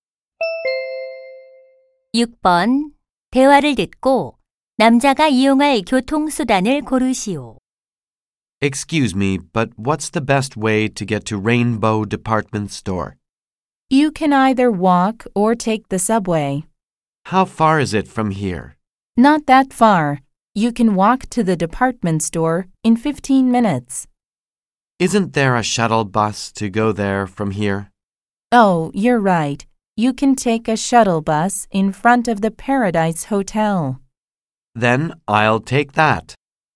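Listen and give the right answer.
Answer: 셔틀버스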